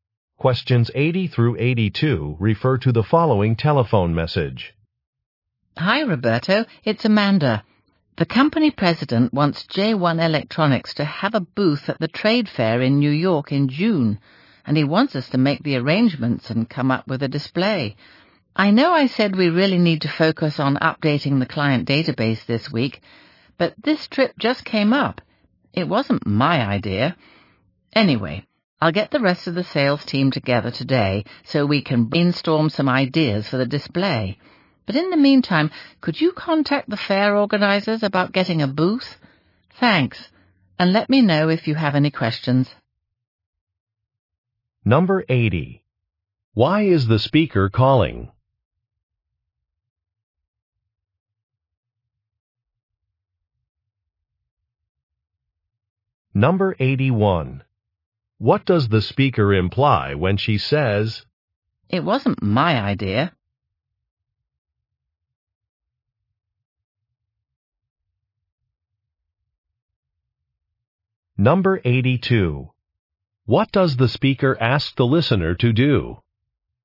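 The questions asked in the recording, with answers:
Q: Why is the speaker calling?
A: To discuss arrangements for a trade fair booth

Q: What does the speaker ask the listener to do?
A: Contact the fair organizers about getting a booth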